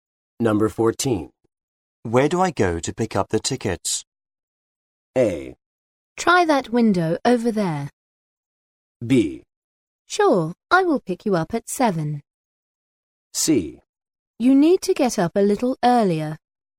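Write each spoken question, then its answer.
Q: Where do I go to pick up the tickets?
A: A: Try that window over there.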